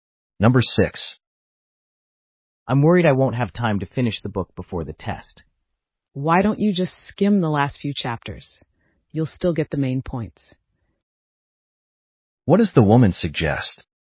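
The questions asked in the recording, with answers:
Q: What does the woman suggest?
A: Skim the last few chapters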